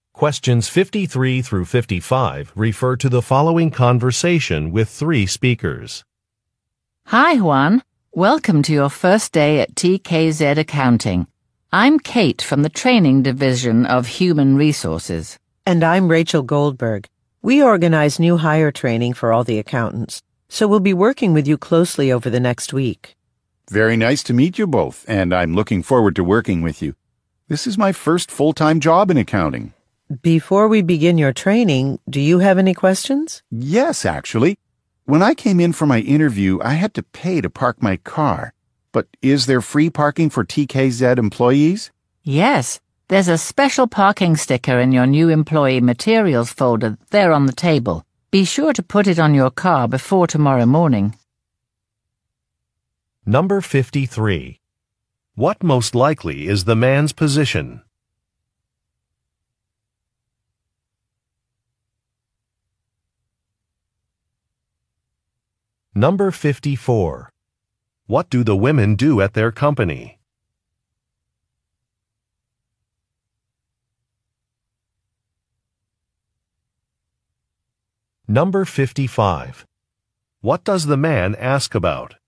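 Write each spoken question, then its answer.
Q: What most likely is the man's position?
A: An accountant (new hire)

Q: What do the women do at their company?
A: They organize new hire training

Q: What does the man ask about?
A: Free parking for employees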